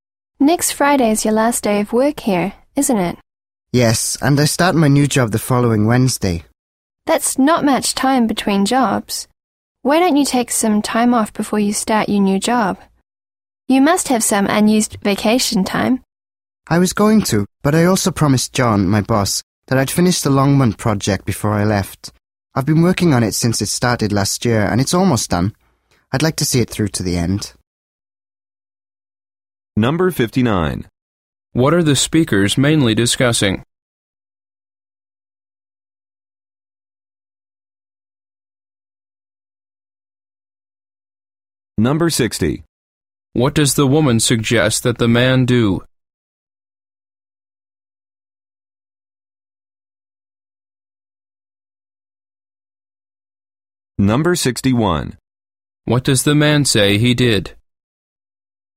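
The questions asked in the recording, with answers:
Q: What are the speakers mainly discussing?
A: The man leaving his job and starting a new one

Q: What does the woman suggest that the man do?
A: Take some time off before starting his new job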